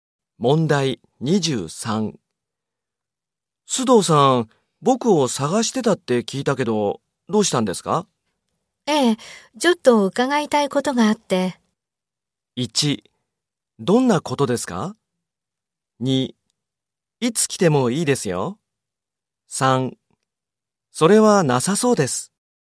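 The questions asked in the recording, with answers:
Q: 須藤さん、僕を探してたって聞いたけど、どうしたんですか?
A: 1: どんなことですか?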